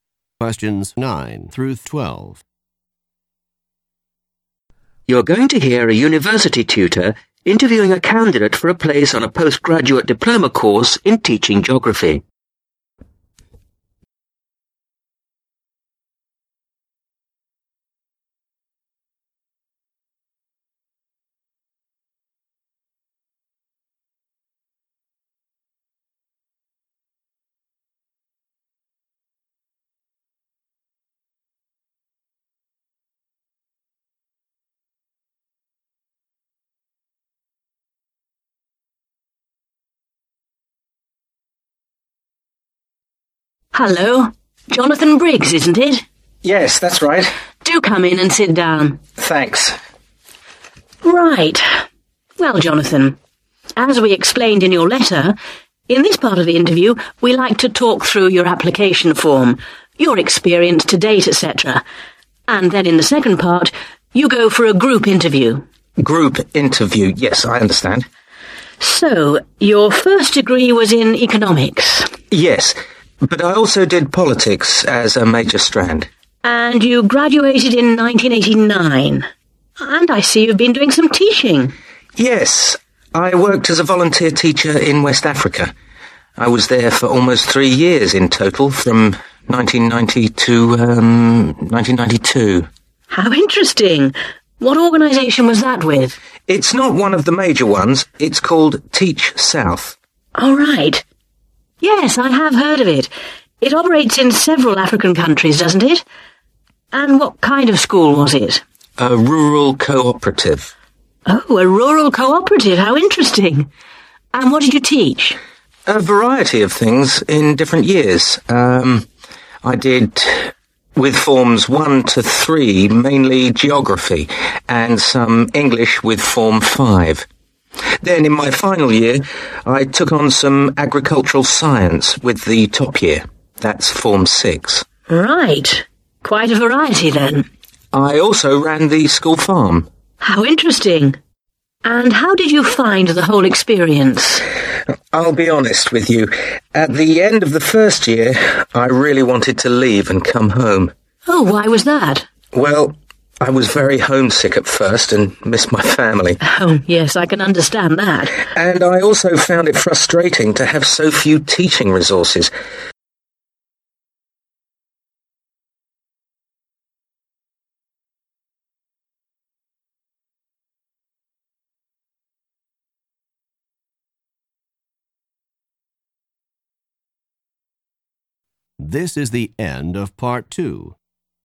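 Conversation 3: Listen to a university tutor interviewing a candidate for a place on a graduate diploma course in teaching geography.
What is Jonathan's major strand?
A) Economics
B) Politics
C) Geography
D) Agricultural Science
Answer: B) Politics

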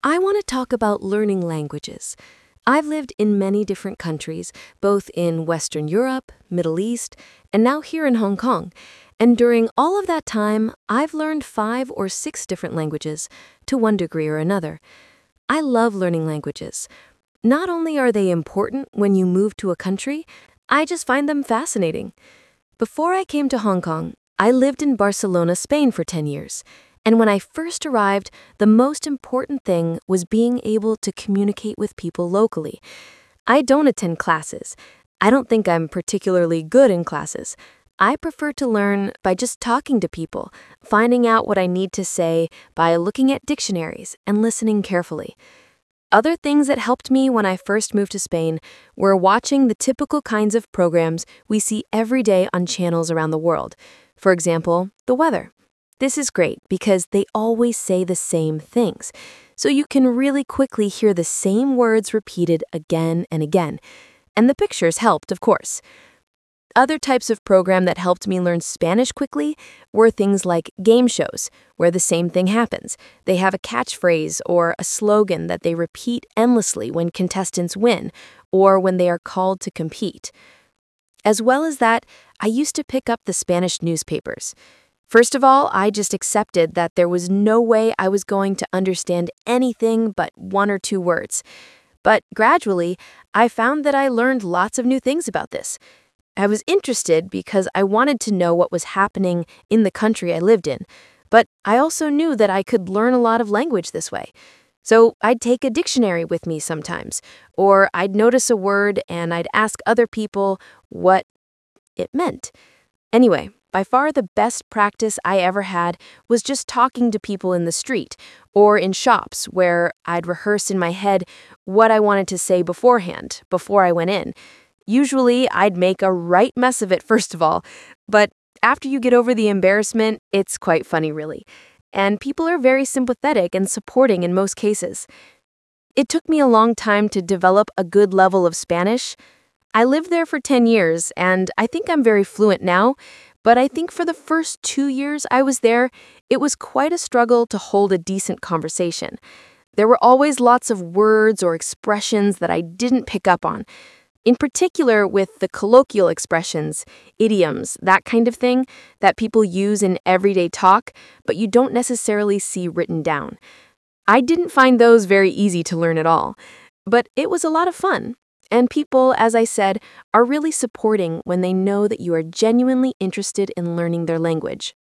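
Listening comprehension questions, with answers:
Talk/Lecture 1: You will hear a talk about learning a language.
Which continent has the speaker not lived in?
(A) Asia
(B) Europe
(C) South America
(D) Middle East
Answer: (C) South America

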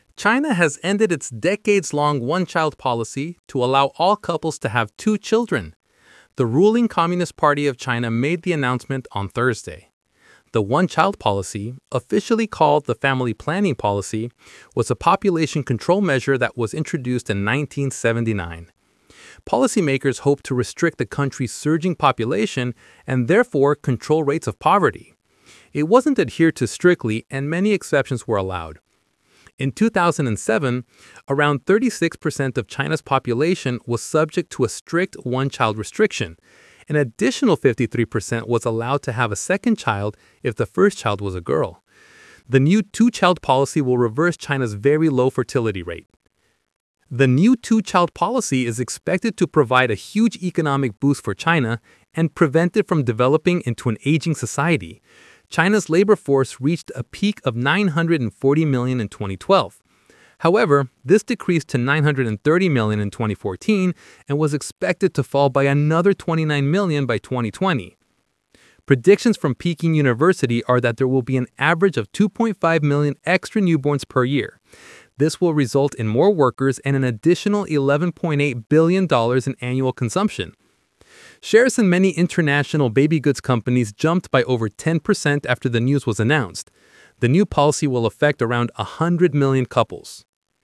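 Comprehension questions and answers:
Talk/Lecture 1: Listen to a talk about the end of China's one-child policy.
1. When was the one-child policy introduced?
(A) 1975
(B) 1979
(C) 1973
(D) 1989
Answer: (B) 1979

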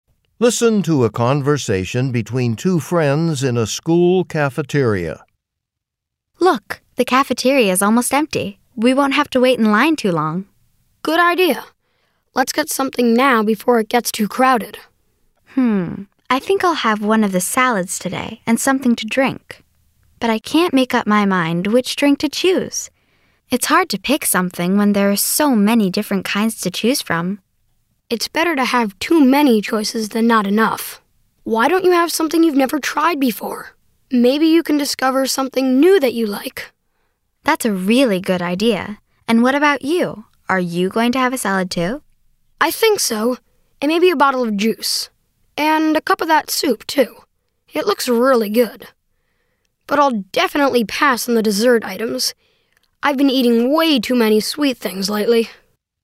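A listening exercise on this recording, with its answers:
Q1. What are the speakers happy to see when they enter the cafeteria?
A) That their friends are there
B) That their favorite foods are being served today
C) That there are few people in the line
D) That the cafeteria will stay open longer than usual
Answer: C) That there are few people in the line

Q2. What do the speakers say about the drinks in the cafeteria?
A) They are expensive.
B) There are not any hot ones.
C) There are many kinds to choose from.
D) The types available change every day.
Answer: C) There are many kinds to choose from.

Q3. What does the boy suggest the girl do?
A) Try something new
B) Ask if there is any soup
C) Read the menu carefully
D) Order the same meal that he orders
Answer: A) Try something new

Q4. What will the boy NOT order for lunch?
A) Juice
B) Soup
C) Salad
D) Dessert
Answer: D) Dessert

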